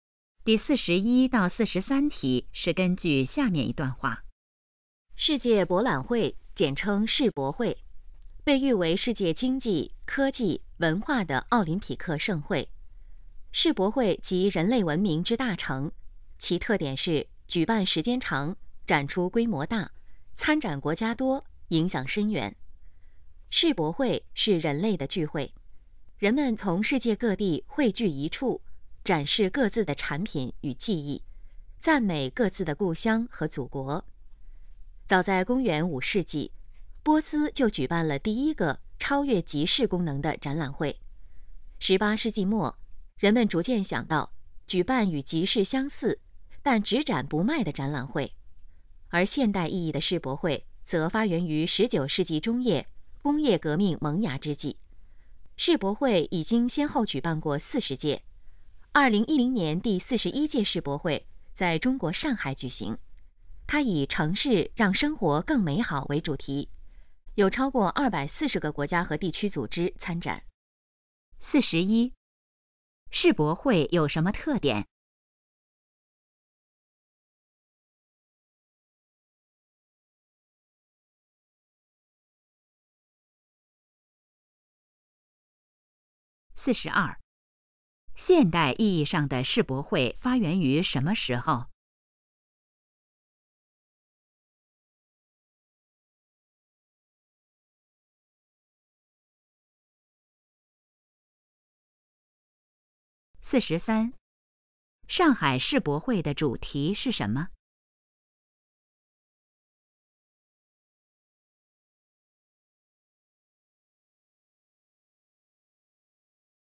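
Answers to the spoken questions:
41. 举办时间长,展出规模大,参展国家多,影响深远
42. 19世纪中叶
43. 城市让生活更美好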